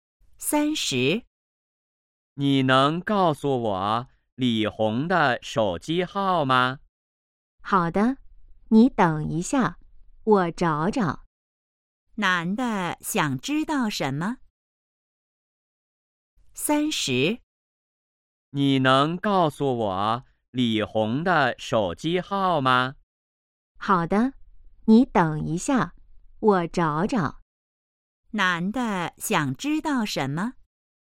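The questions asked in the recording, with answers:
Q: 男的想知道什么?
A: 李红的手机号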